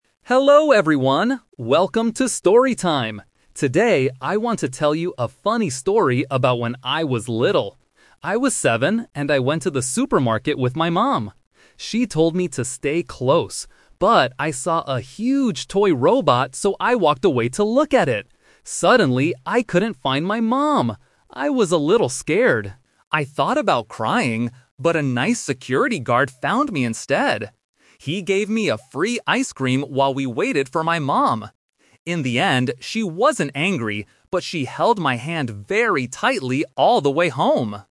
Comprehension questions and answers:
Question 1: Why did the boy walk away from his mom?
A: He wanted to look at a toy.

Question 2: Who helped the boy when he was lost?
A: A security guard

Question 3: What did the boy do while waiting for his mom?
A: He ate some ice cream.

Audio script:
Hello, everyone! Welcome to 'Story Time'! Today, I want to tell you a funny story about when I was little. I was seven, and I went to the supermarket with my mom. She told me to stay close. But, I saw a huge toy robot, so I walked away to look at it. Suddenly, I couldn't find my mom! I was a little scared. I thought about crying, but a nice security guard found me instead. He gave me a free ice cream while we waited for my mom. In the end, she wasn't angry, but she held my hand very tightly all the way home!